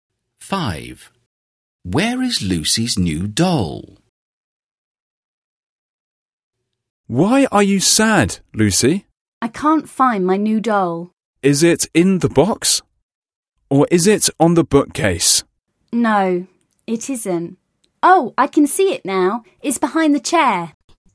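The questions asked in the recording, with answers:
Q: Where is Lucy's new doll?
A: Behind the chair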